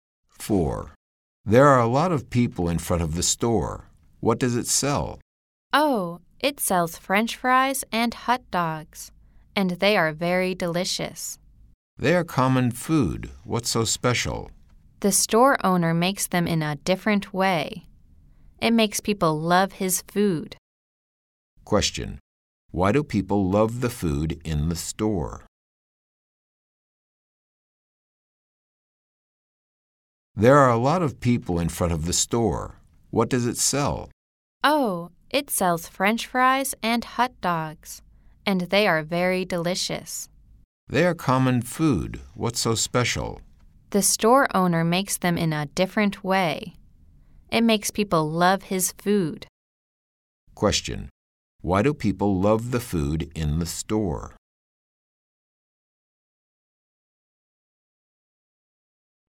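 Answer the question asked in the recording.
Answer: The store owner makes it in a different way.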